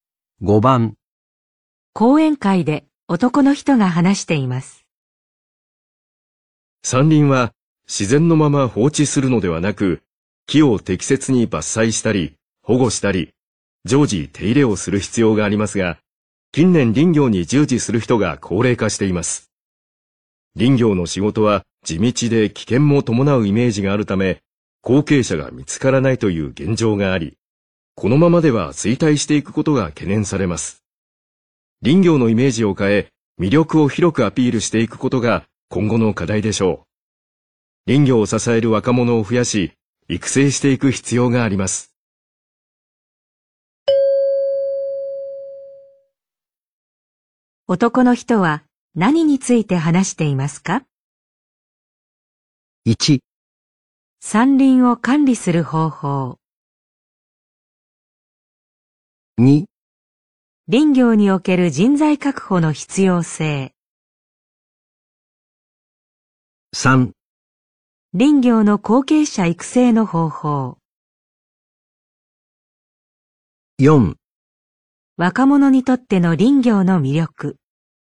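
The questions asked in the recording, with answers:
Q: 男の人は何について話していますか?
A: 2: 林業における人材確保の必要性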